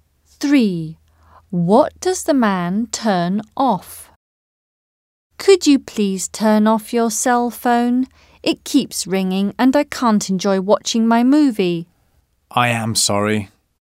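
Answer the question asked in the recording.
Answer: his cell phone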